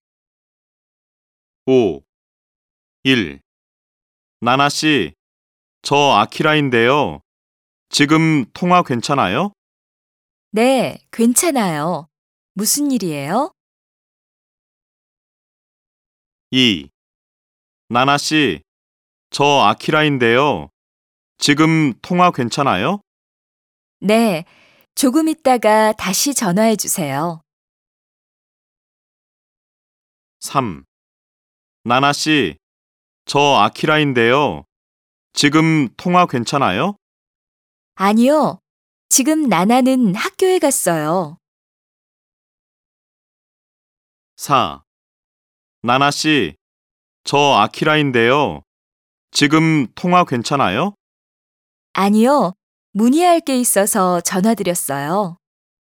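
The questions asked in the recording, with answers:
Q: 나나 씨, 저 아키라인데요. 지금 통화 괜찮아요?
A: 1: 네, 괜찮아요. 무슨 일이에요?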